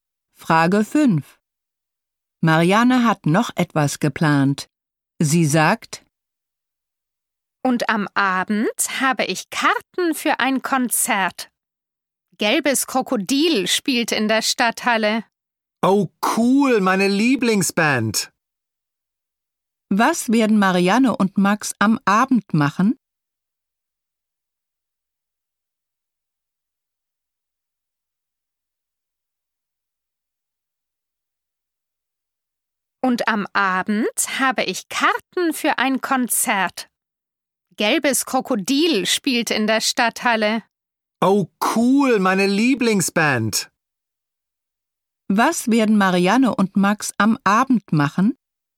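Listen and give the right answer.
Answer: Zu einem Konzert gehen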